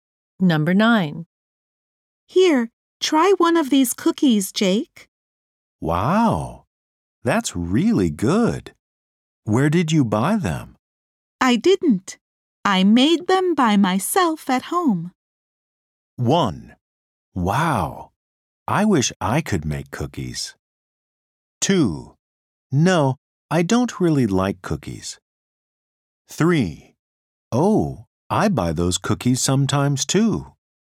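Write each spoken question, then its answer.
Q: I didn't. I made them by myself at home.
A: 1: Wow, I wish I could make cookies.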